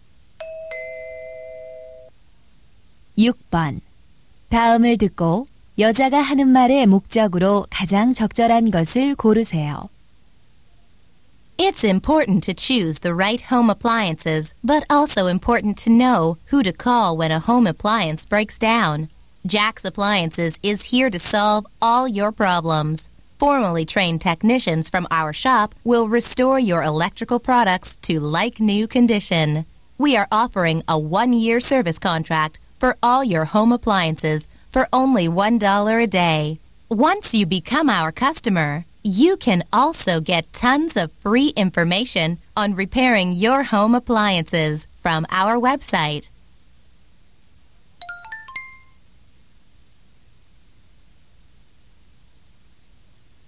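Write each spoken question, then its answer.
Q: 다음을 듣고 여자가 하는 말의 목적으로 가장 적절한 것을 고르세요.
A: 가전제품 수리 서비스 광고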